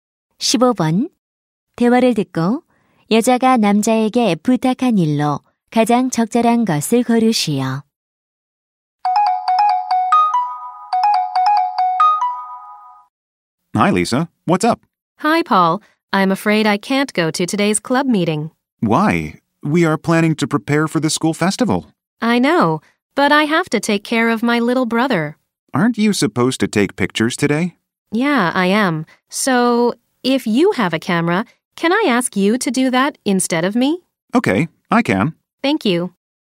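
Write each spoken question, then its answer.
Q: 대화를 듣고 여자가 남자에게 부탁한 일로 가장 적절한 것을 고르시오.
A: 동아리 모임에서 대신 사진 찍기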